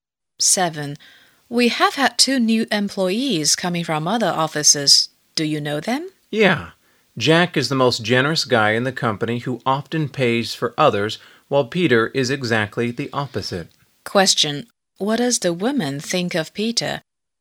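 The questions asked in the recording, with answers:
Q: What does the woman think of Peter?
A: He is mean / stingy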